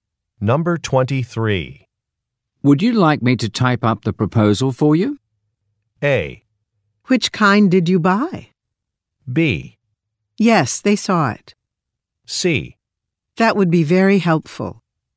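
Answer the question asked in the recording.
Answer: C: That would be very helpful.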